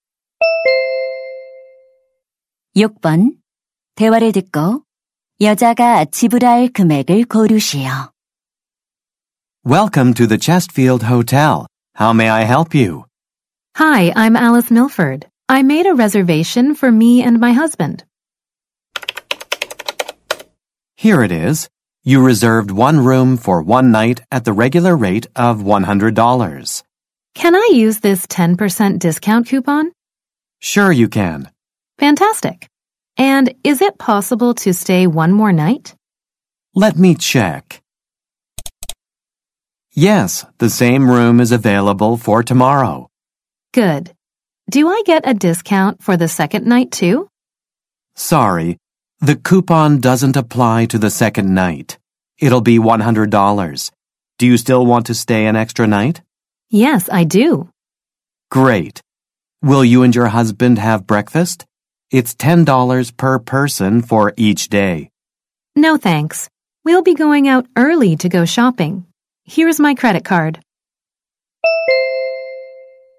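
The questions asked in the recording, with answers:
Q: 대화를 듣고 여자가 지불할 금액을 고르시오.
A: $190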